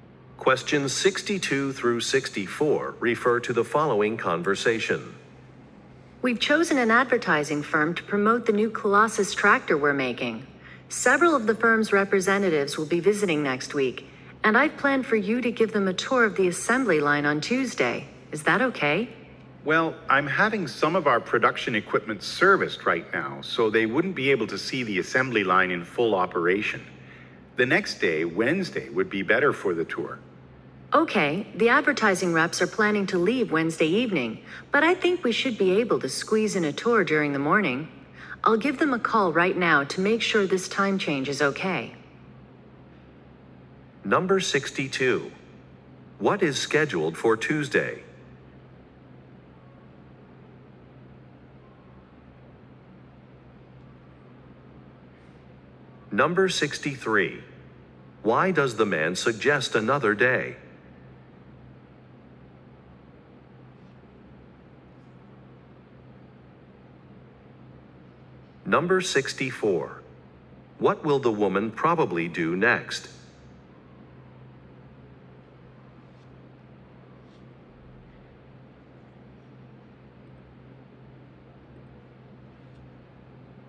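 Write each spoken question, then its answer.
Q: What is scheduled for Tuesday?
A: A tour of the assembly line for the advertising firm's representatives

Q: Why does the man suggest another day?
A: Some production equipment is being serviced, so the assembly line won't be in full operation

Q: What will the woman probably do next?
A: Call the advertising representatives to confirm the time change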